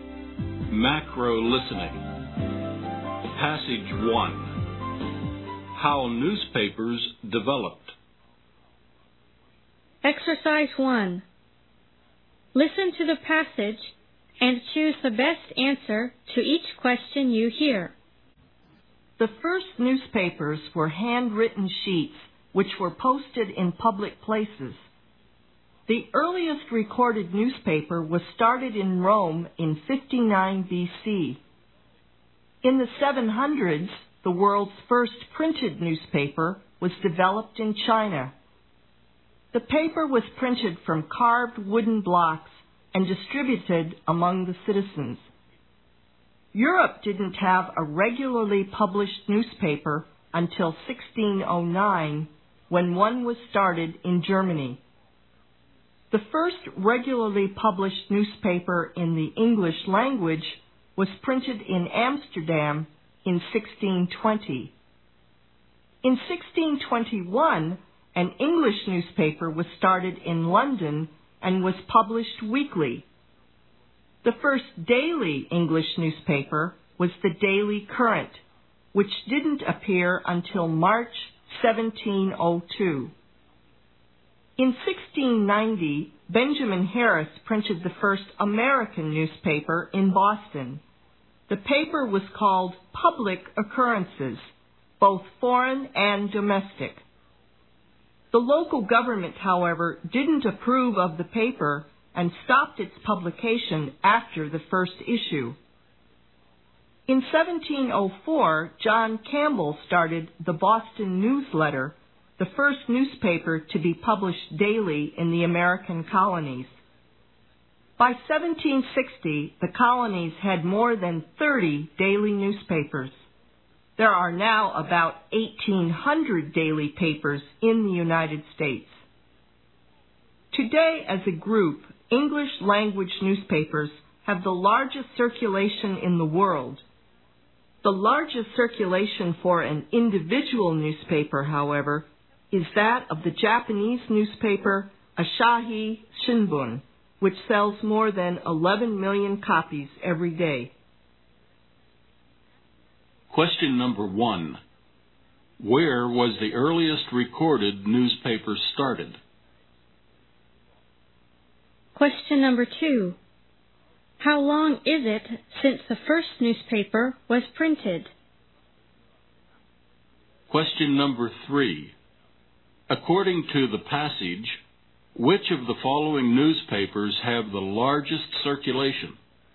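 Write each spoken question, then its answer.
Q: Where was the earliest recorded newspaper started?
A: In Rome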